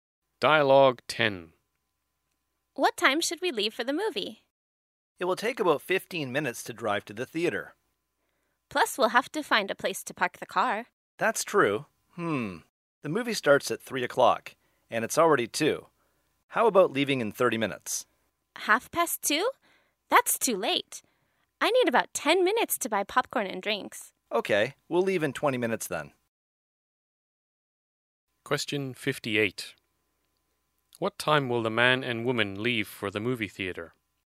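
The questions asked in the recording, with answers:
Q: What time will the man and woman leave for the movie theater?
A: At 2:20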